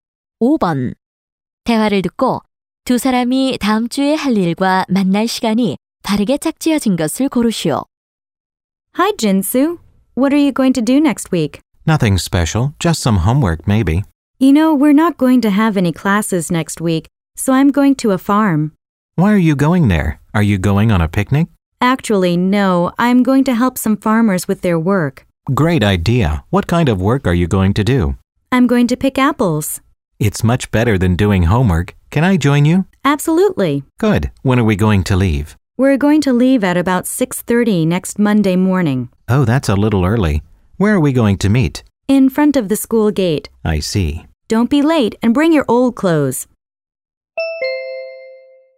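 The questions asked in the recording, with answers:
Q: 대화를 듣고 두 사람이 다음 주에 할 일과 만날 시간이 바르게 짝지어진 것을 고르시오.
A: 사과 따기 - 월요일 아침 6시 30분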